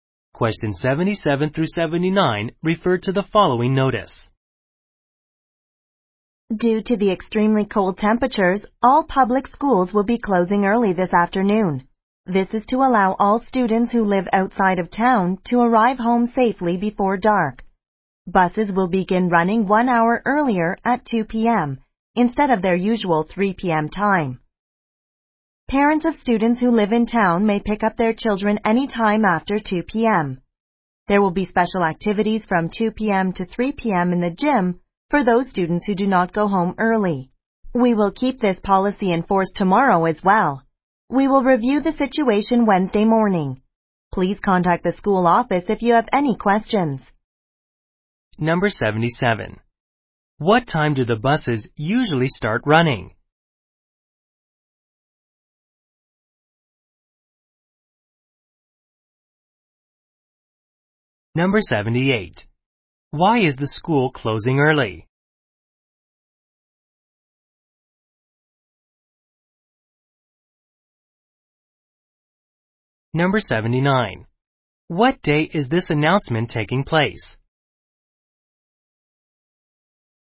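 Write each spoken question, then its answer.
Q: What time do the buses usually start running?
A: 3 p.m.

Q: Why is the school closing early?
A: Because of extremely cold temperatures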